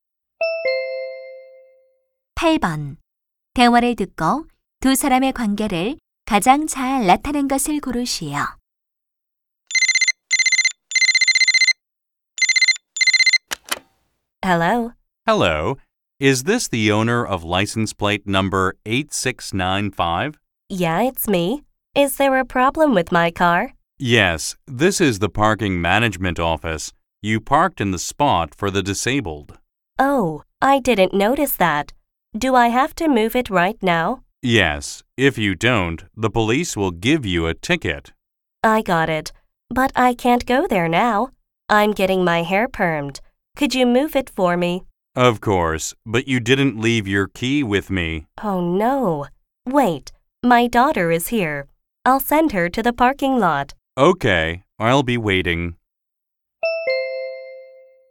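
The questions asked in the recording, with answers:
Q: 대화를 듣고 두 사람의 관계를 가장 잘 나타낸 것을 고르시오.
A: 주차 관리인 - 차량 주인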